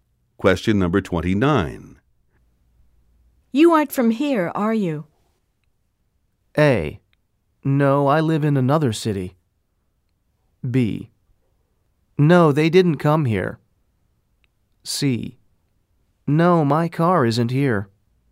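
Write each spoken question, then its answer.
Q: You aren't from here, are you?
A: A: No, I live in another city.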